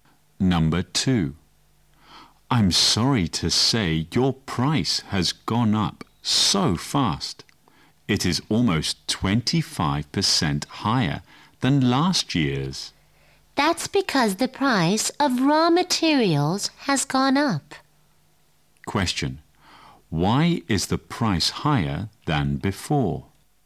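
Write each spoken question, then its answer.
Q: Why is the price higher than before?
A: Because the price of raw materials has gone up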